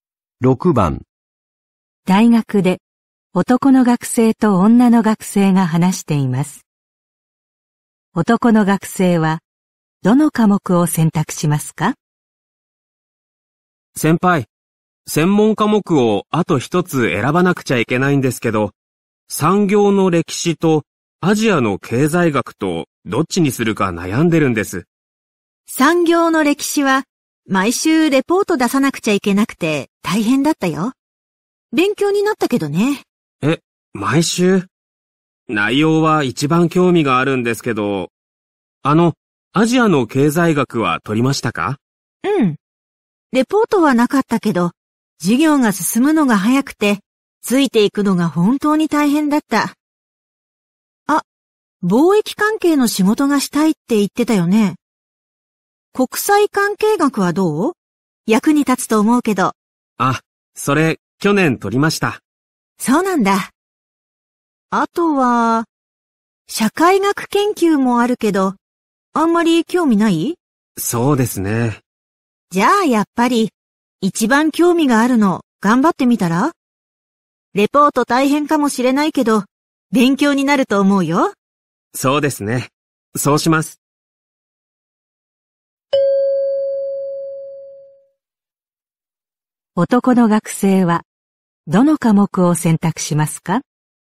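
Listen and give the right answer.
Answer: 産業の歴史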